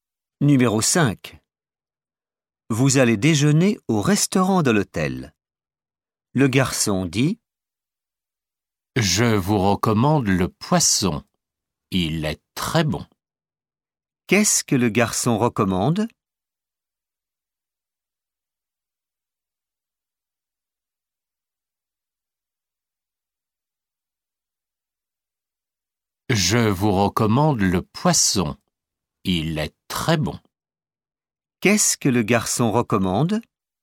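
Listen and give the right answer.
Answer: le poisson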